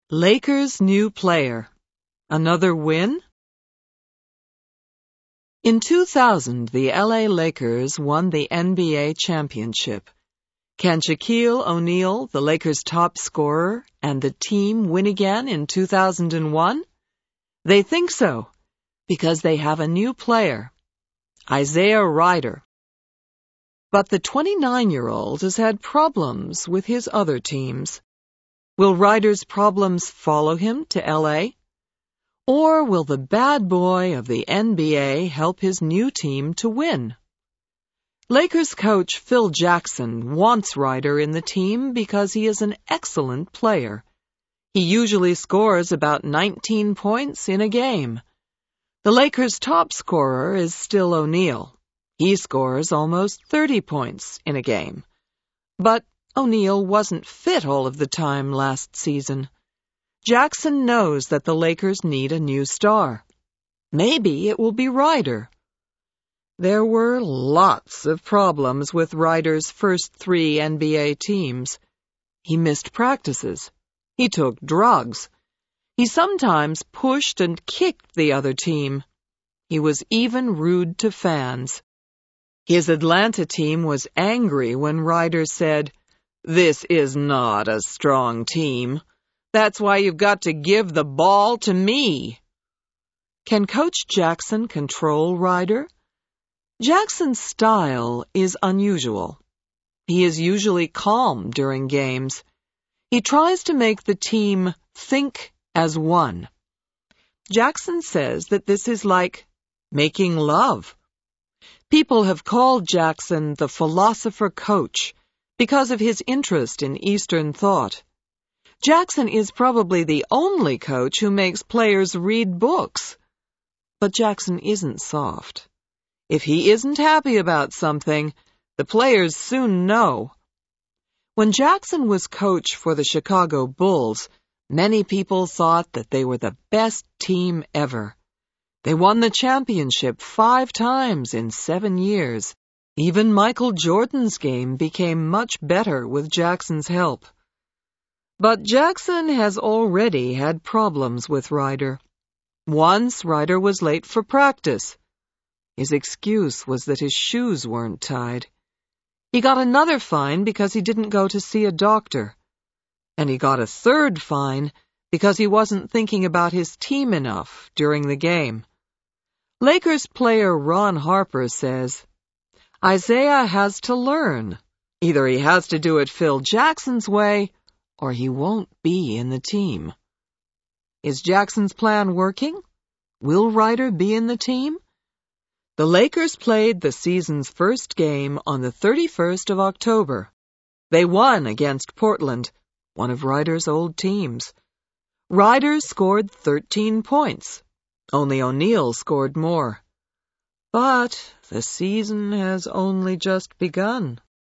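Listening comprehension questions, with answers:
Answer these questions TRUE or FALSE:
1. The Lakers are Rider's first team in the NBA.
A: FALSE

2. Shaquille O'Neal plays for the Chicago Bulls.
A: FALSE

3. Isaiah Rider has played for seven years with the LA Lakers.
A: FALSE

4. Before his first game for the Lakers, Isaiah Rider had three fines.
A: TRUE

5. Phil Jackson tells players not to think about other players during a game.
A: FALSE

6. Shaqille O'Neal usually scores over 20 points in a game.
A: TRUE

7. Michael Jordan is helping the LA Lakers.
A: FALSE

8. The Lakers won their first game with Rider.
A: TRUE

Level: Intermediate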